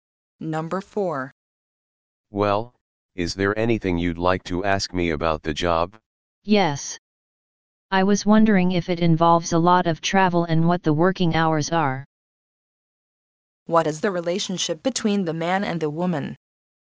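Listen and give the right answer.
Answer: Job interviewer and job applicant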